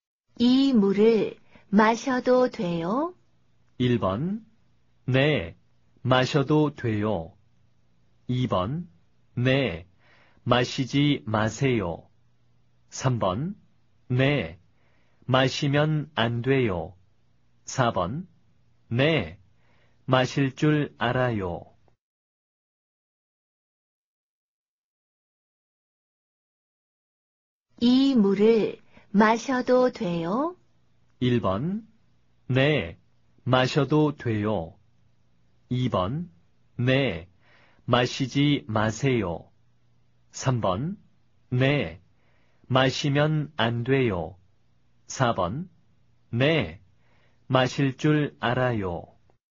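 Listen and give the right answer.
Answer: 1: 네, 마셔도 돼요.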